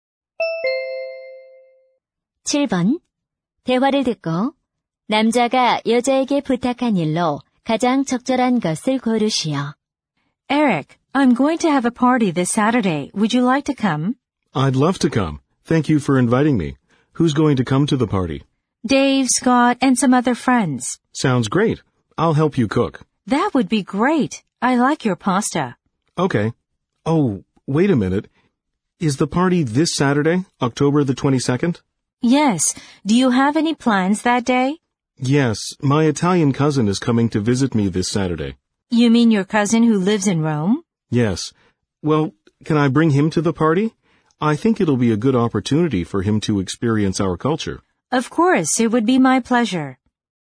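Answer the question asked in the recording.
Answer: 이탈리아 사촌을 파티에 데려가도 되는지 허락받기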